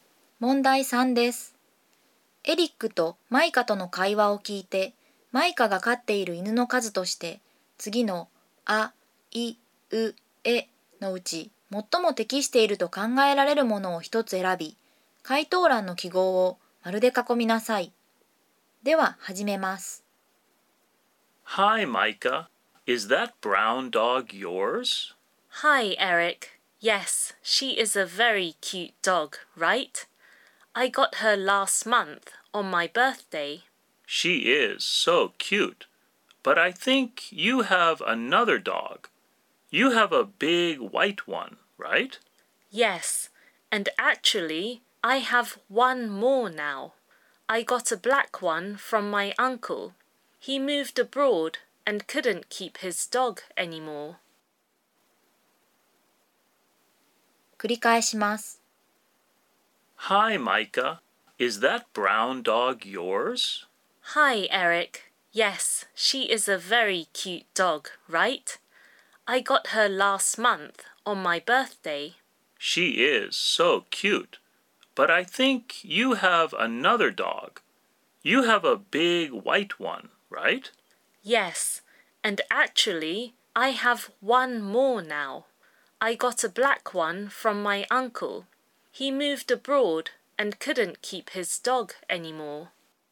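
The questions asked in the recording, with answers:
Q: エリックとマイカとの会話を聞いて、マイカが飼っている犬の数として、次のあ、い、う、えのうち最も適していると考えられるものを一つ選び、回答欄の記号を丸で囲みなさい。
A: 3匹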